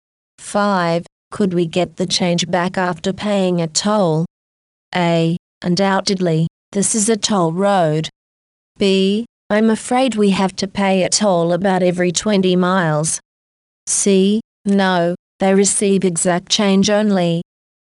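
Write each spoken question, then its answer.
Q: Could we get the change back after paying a toll?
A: C: No, they receive exact change only.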